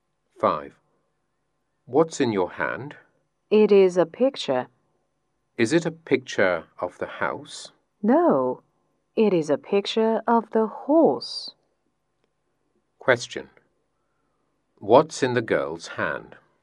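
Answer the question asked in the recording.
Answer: A picture of a horse.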